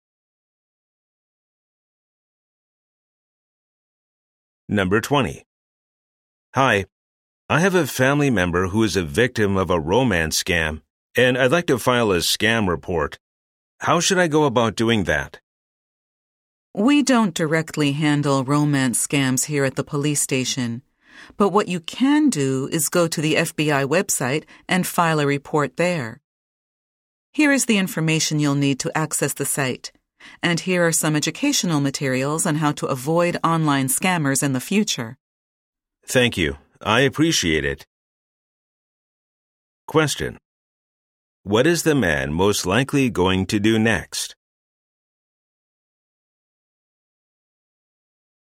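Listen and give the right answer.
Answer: File a scam report on the FBI website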